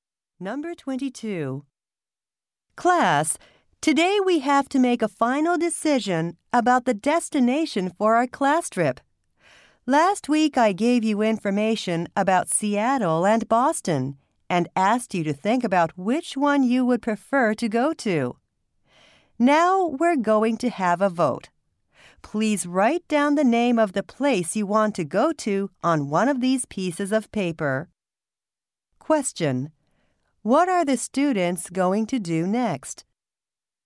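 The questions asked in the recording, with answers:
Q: What are the students going to do next?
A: Vote on the destination for their class trip.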